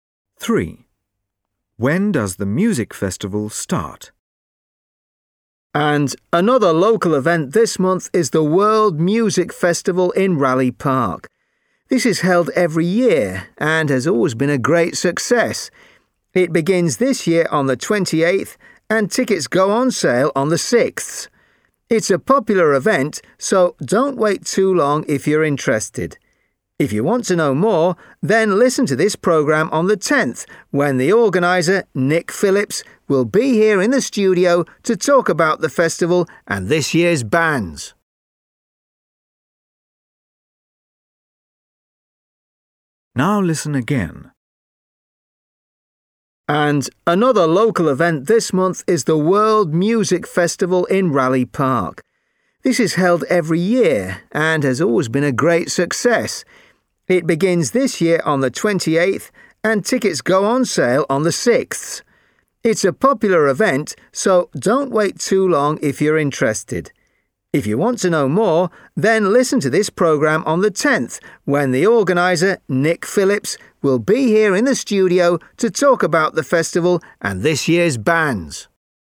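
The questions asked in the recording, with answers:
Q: When does the music festival start?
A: On the 28th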